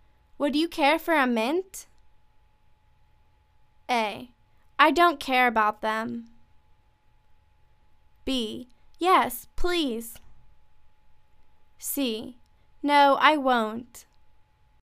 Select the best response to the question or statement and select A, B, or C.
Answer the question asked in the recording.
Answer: Yes, please.